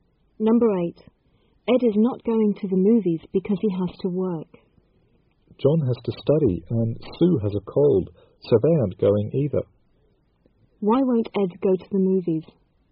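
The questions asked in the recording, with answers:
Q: Why won't Ed go to the movies?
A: He has to work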